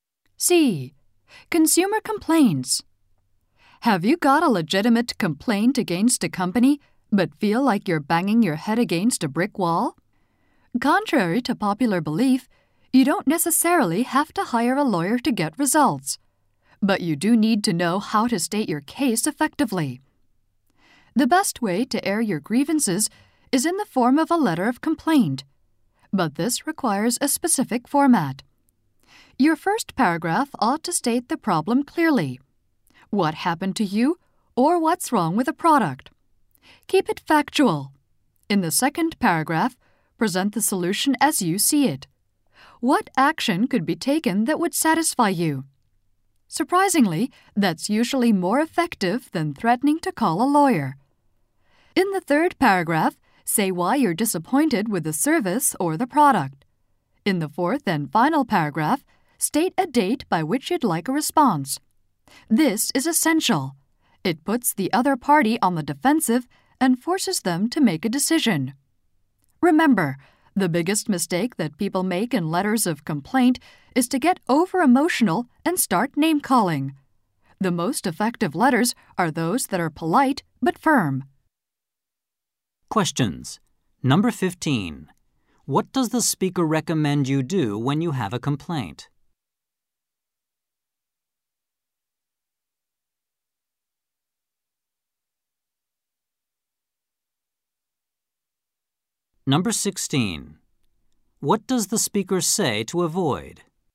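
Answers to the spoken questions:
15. Write a letter of complaint in a specific format
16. Getting over-emotional and name-calling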